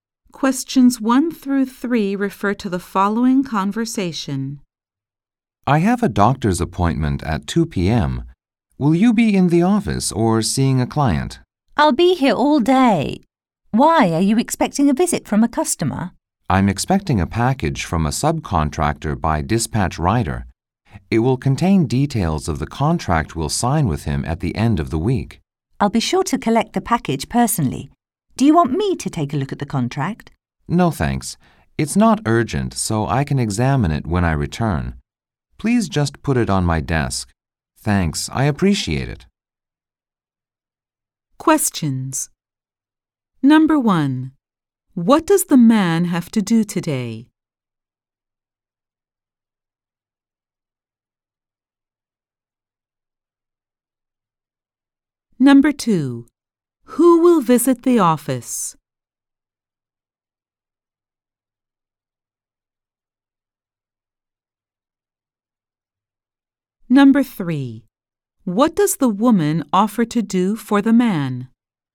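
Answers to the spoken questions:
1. Go to a doctor's appointment
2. A dispatch rider delivering a package from a subcontractor
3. Take a look at the contract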